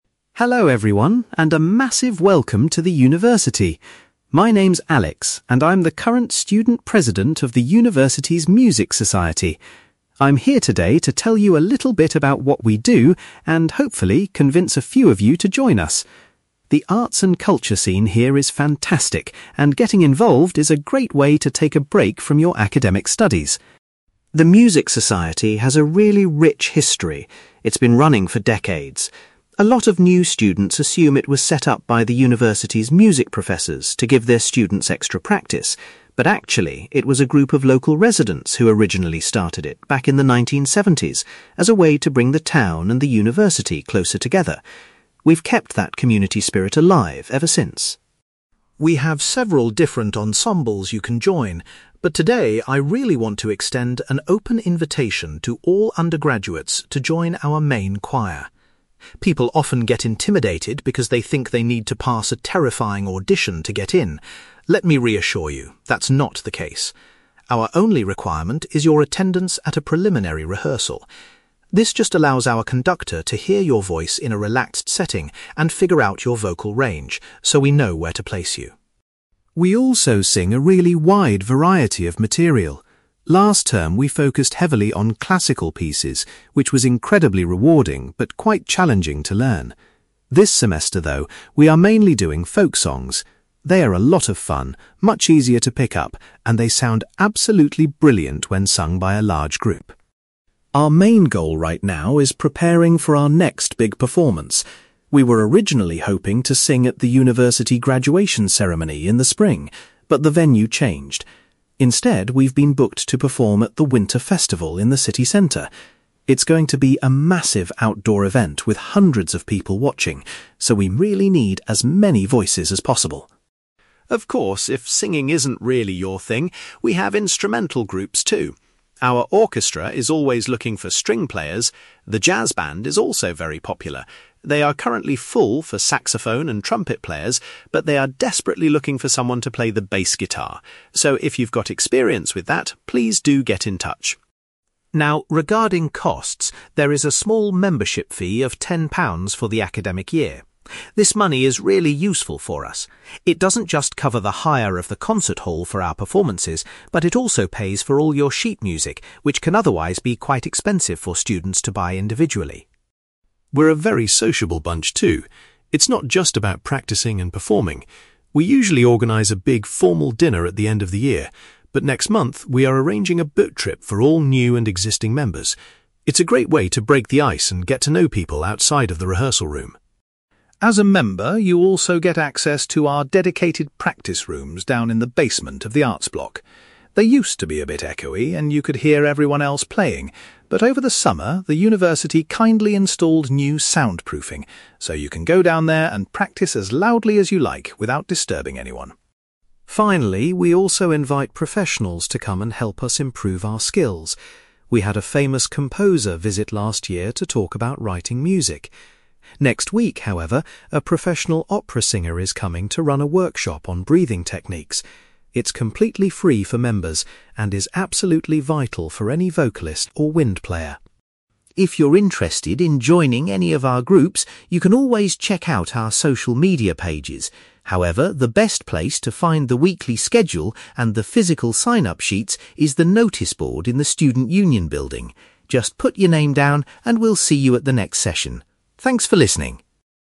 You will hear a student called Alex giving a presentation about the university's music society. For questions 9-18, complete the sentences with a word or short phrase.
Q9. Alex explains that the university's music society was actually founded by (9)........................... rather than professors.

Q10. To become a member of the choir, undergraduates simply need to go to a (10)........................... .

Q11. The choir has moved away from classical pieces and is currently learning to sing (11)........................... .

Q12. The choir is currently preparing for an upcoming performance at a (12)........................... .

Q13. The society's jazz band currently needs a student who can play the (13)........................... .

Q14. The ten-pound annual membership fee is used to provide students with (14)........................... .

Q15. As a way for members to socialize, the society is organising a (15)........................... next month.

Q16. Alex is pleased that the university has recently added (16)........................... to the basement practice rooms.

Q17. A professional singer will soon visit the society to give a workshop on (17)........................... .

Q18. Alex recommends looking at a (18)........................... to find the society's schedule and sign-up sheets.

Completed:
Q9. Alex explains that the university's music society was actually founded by local residents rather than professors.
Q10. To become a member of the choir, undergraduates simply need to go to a preliminary rehearsal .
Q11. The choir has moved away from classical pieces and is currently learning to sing folk songs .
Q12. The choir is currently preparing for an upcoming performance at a winter festival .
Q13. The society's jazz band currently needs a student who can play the bass guitar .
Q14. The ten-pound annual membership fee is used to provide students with sheet music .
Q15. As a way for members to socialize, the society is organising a boat trip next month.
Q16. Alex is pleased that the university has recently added soundproofing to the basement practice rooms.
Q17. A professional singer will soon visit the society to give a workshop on breathing techniques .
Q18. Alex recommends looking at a noticeboard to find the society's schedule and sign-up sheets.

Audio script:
Alex: Hello everyone, and a massive welcome to the university! My name is Alex, and I'm the current student president of the university's music society. I'm here today to tell you a little bit about what we do and, hopefully, convince a few of you to join us. The arts and culture scene here is fantastic, and getting involved is a great way to take a break from your academic studies.
The music society has a really rich history. It's been running for decades. A lot of new students assume it was set up by the university's music professors to give their students extra practice. But actually, it was a group of local residents who originally started it back in the 1970s, as a way to bring the town and the university closer together. We've kept that community spirit alive ever since.
We have several different ensembles you can join, but today I really want to extend an open invitation to all undergraduates to join our main choir. People often get intimidated because they think they need to pass a terrifying audition to get in. Let me reassure you, that's not the case. Our only requirement is your attendance at a preliminary rehearsal. This just allows our conductor to hear your voice in a relaxed setting and figure out your vocal range, so we know where to place you.
We also sing a really wide variety of material. Last term, we focused heavily on classical pieces, which was incredibly rewarding but quite challenging to learn. This semester, though, we are mainly doing folk songs. They are a lot of fun, much easier to pick up, and they sound absolutely brilliant when sung by a large group.
Our main goal right now is preparing for our next big performance. We were originally hoping to sing at the university graduation ceremony in the spring, but the venue changed. Instead, we've been booked to perform at the winter festival in the city centre. It's going to be a massive outdoor event with hundreds of people watching, so we really need as many voices as possible!
Of course, if singing isn't really your thing, we have instrumental groups too. Our orchestra is always looking for string players. The jazz band is also very popular; they are currently full for saxophone and trumpet players, but they are desperately looking for someone to play the bass guitar. So, if you've got experience with that, please do get in touch.
Now, regarding costs, there is a small membership fee of ten pounds for the academic year. This money is really useful for us. It doesn't just cover the hire of the concert hall for our performances, but it also pays for all your sheet music, which can otherwise be quite expensive for students to buy individually.
We're a very sociable bunch, too. It's not just about practicing and performing. We usually organise a big formal dinner at the end of the year, but next month we are arranging a boat trip for all new and existing members. It's a great way to break the ice and get to know people outside of the rehearsal room.
As a member, you also get access to our dedicated practice rooms down in the basement of the arts block. They used to be a bit echoey and you could hear everyone else playing, but over the summer, the university kindly installed new soundproofing. So, you can go down there and practice as loudly as you like without disturbing anyone.
Finally, we also invite professionals to come and help us improve our skills. We had a famous composer visit last year to talk about writing music. Next week, however, a professional opera singer is coming to run a workshop on breathing techniques. It's completely free for members and is absolutely vital for any vocalist or wind player.
If you're interested in joining any of our groups, you can always check out our social media pages. However, the best place to find the weekly schedule and the physical sign-up sheets is the noticeboard in the student union building. Just put your name down, and we'll see you at the next session. Thanks for listening!

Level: B2